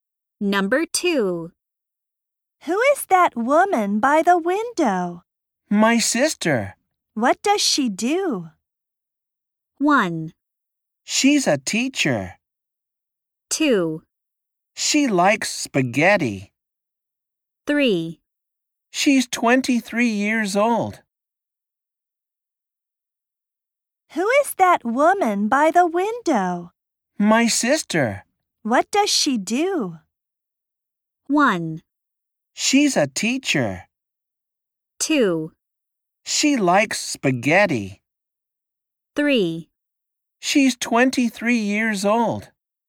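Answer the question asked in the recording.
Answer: 1: She's a teacher.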